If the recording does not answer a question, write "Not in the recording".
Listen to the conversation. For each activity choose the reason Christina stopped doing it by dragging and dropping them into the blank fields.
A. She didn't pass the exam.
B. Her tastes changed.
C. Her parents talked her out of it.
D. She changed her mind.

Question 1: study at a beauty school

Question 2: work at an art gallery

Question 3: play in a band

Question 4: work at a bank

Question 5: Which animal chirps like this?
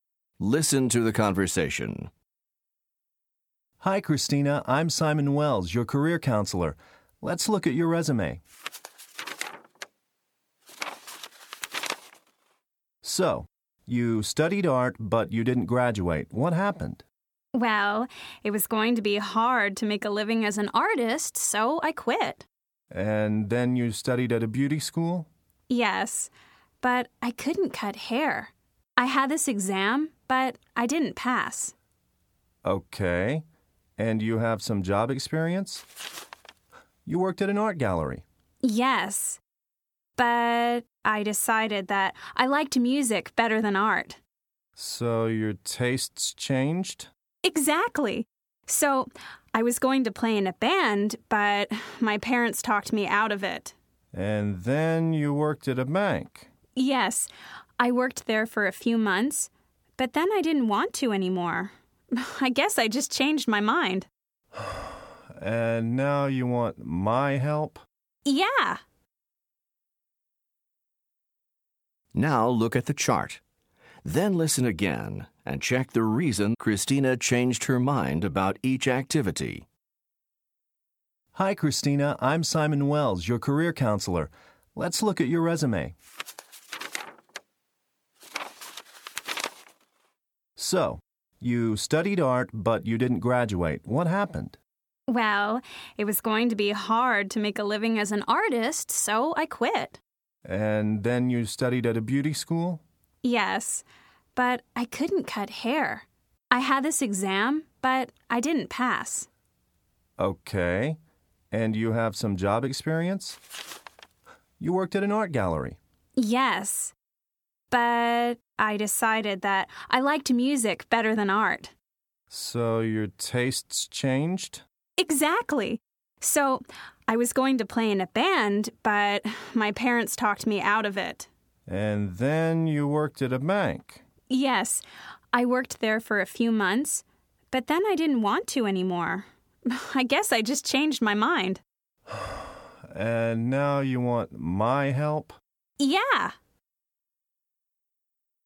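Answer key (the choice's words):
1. She didn't pass the exam.
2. Her tastes changed.
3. Her parents talked her out of it.
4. She changed her mind.
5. Not in the recording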